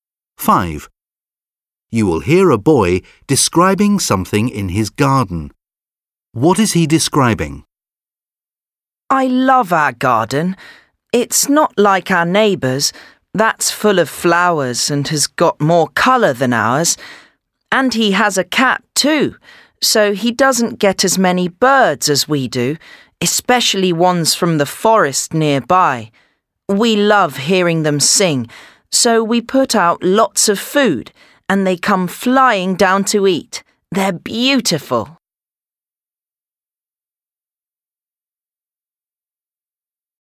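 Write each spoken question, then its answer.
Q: What is he describing?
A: The birds that come to his garden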